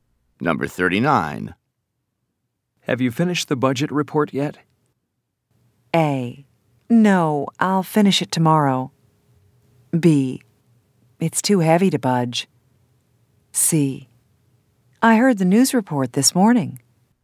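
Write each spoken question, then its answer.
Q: Have you finished the budget report yet?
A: A: No, I'll finish it tomorrow.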